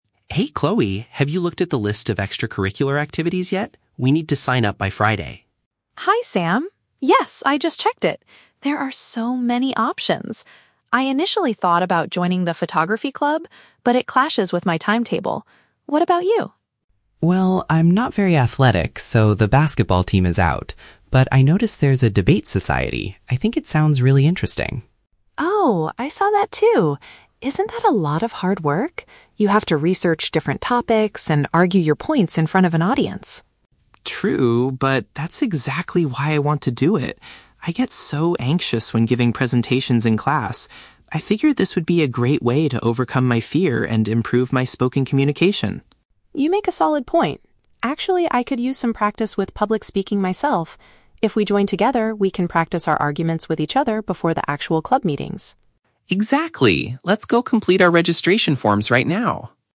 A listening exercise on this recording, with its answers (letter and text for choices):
Listen to the conversation between two new students and choose the correct answer (A, B, or C) for each question.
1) Why did Chloe decide NOT to join the photography club?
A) She does not have the right equipment for it.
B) Its meeting hours conflict with her availability.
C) She thinks the activities require too much hard work.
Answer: B) Its meeting hours conflict with her availability.

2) What is Sam's main reason for choosing the Debate Society?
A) He wants to become more confident when speaking to an audience.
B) He wants to learn how to research different academic topics.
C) He hopes to participate in school basketball tournaments.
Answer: A) He wants to become more confident when speaking to an audience.

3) What will the students do immediately after the conversation?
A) Practice an argument for their upcoming club meeting.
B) Give a presentation in front of their classmates.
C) Officially apply to become members of the club.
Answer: C) Officially apply to become members of the club.

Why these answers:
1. Chloe says the photography club "clashes with my timetable". Option B paraphrases this as "meeting hours conflict with her availability". The Trap: Option (C) is a trap. Chloe mentions "a lot of hard work", but she says this about the Debate Society, not the photography club. Option (A) is plausible but is not mentioned in the audio.
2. Sam explains that he gets "anxious when giving presentations" and wants to "overcome my fear and improve my spoken communication." Option A summarizes this perfectly. The Trap: Option (B) contains the word "research", but researching topics is just a task they have to do in the club, not Sam's main reason for joining. Option (C) mentions "basketball", which Sam explicitly says is "out" because he is not athletic.
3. At the end, Sam says, "Let's go complete our registration forms right now." Option C paraphrases this as "officially apply to become members". The Trap: Option (A) is a trap. They agree to "practice our arguments" in the future, but it is not what they are doing right now. Option (B) is also a trap; Sam mentions giving presentations in class as a past/general problem, not an immediate action.

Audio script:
Sam: Hey Chloe, have you looked at the list of extracurricular activities yet? We need to sign up by Friday.
Chloe: Hi Sam. Yes, I just checked it. There are so many options! I initially thought about joining the photography club, but it clashes with my timetable. What about you?
Sam: Well, I'm not very athletic, so the basketball team is out. But I noticed there's a Debate Society. I think it sounds really interesting.
Chloe: Oh, I saw that too. Isn't that a lot of hard work? You have to research different topics and argue your points in front of an audience.
Sam: True, but that's exactly why I want to do it. I get so anxious when giving presentations in class. I figure this would be a great way to overcome my fear and improve my spoken communication.
Chloe: You make a solid point. Actually, I could use some practice with public speaking myself. If we join together, we can practice our arguments with each other before the actual club meetings.